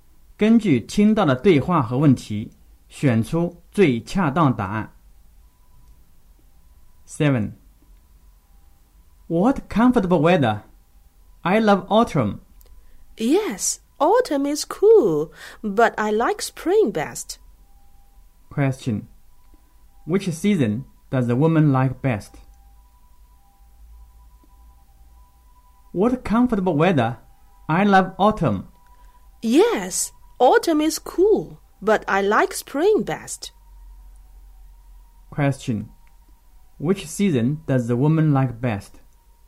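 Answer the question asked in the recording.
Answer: Spring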